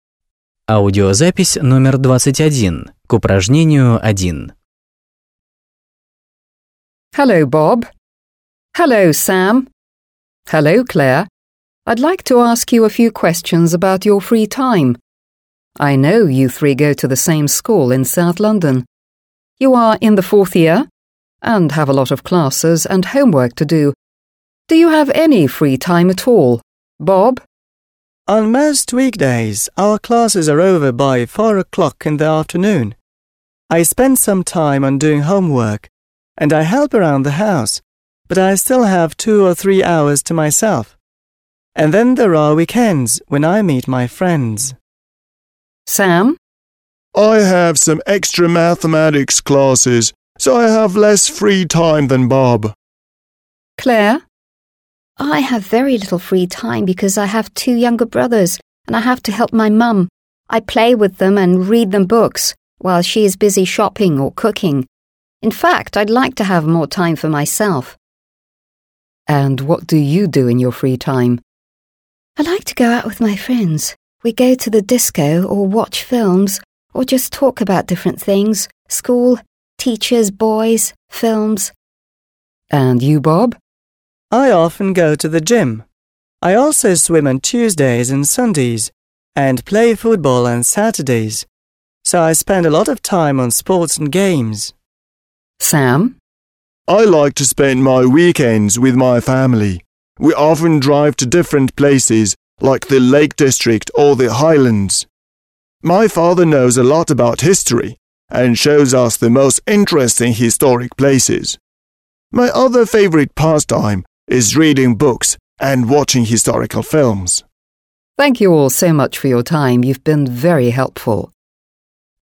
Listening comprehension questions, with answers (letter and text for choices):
1. Listen, Audio (21), and put the appropriate names (Bob, Clare or Sam) into these sentences.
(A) Bob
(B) Clare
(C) Sam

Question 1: Sam does maths after school.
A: (C) Sam

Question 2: Clare has very little free time because there are two younger children in the family.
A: (B) Clare

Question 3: Bob meets friends at weekends.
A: (A) Bob

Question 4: Bob does a lot of sport.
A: (A) Bob

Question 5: Clare likes to spend free time with friends.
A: (B) Clare

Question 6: Sam travels about the country at weekends.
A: (C) Sam

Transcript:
I'd like to ask you a few questions about your free time. I know you three go to the same school in South London. You are in the fourth year and have a lot of classes and homework to do. Do you have any free time at all?
− On most weekdays our classes are over by four o'clock in the afternoon. I spend some time on doing homework and I help around the house, but I still have two or three hours to myself. And then there are weekends when I meet my friends.
− I have some extra mathematics classes, so I have less free time than Bob.
− I have very little free time because I have two younger brothers and I have to help my mum. I play with them and read them books while she is busy shopping or cooking. In fact I'd like to have more time for myself.
− And what do you do in your free time?
− I like to go out with my friends. We go to the disco or watch video films or just talk about different things − school, teachers, boys, films.
− And you, Bob?
− I often go to the gym. I also swim on Tuesdays and Sundays and play football on Saturdays, so I spend a lot of time on sports and games.
− I like to spend my weekends with my family. We often drive to different places like the Lake District or the Highlands. My father knows a lot about history and shows us the most interesting historic places. My other favourite pastime is reading books and watching historical films.
− Thank you all so much for your time. You've been very helpful.

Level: 8 класс